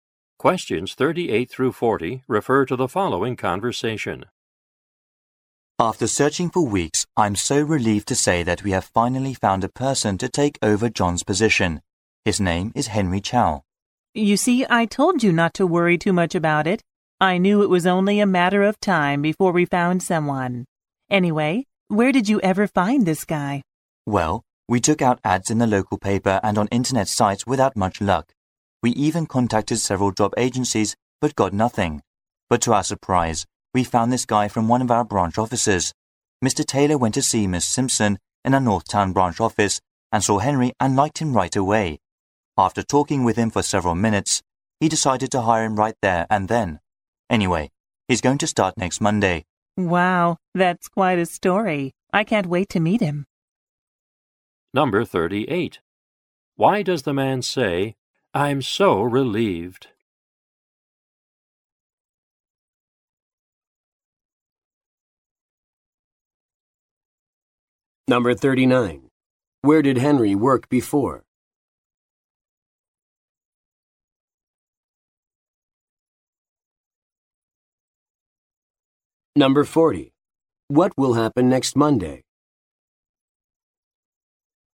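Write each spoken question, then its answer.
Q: Why does the man say, "I'm so relieved"?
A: They finally found someone to replace John

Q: Where did Henry work before?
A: At the North Town branch office

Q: What will happen next Monday?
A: Henry will start working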